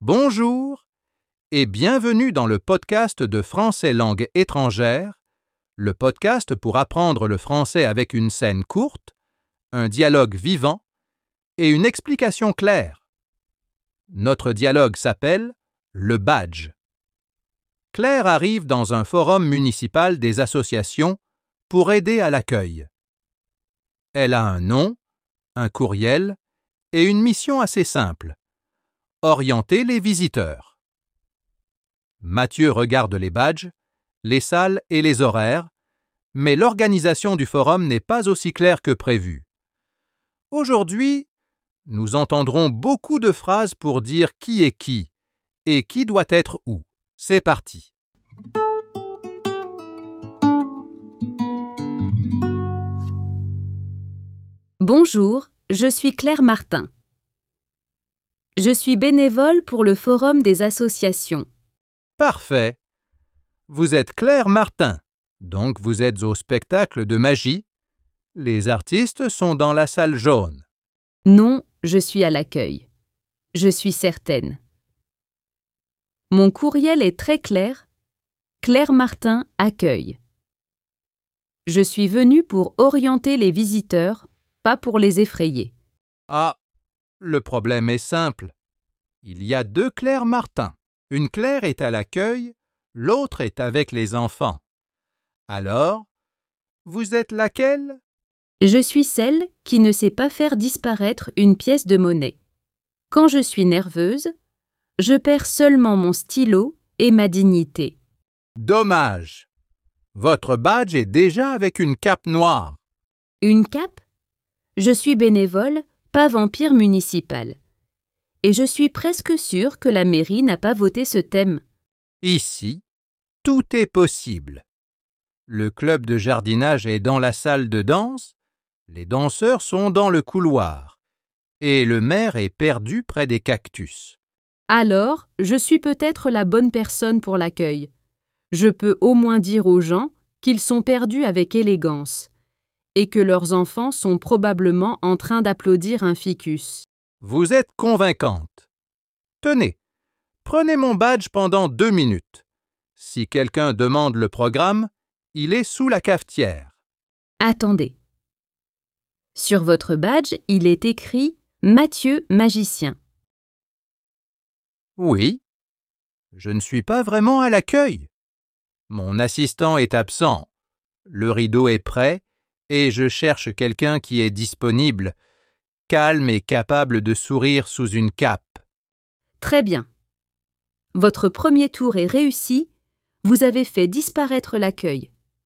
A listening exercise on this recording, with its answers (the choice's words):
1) Pourquoi Claire arrive-t-elle au forum ?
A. Elle vient comme bénévole pour l'accueil.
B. Elle vient faire un spectacle de magie.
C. Elle vient chercher le maire près des cactus.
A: Elle vient comme bénévole pour l'accueil.

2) Quel est le vrai rôle de Mathieu ?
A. Il est responsable du club de jardinage.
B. Il est magicien et cherche une personne pour l'aider.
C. Il est le maire de la ville.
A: Il est magicien et cherche une personne pour l'aider.

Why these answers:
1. Relisez surtout les premières répliques : Claire donne son nom, puis son rôle. La réponse correcte doit respecter ce qu'elle dit d'elle-même, pas ce que Mathieu croit.
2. La réponse apparaît quand Claire lit le badge de Mathieu. Avant ce moment, il parle comme s'il était à l'accueil, mais son vrai rôle est ailleurs.